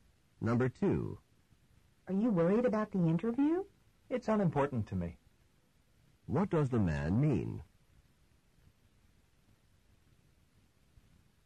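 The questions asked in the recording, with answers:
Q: What does the man mean?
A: He isn't worried about the interview.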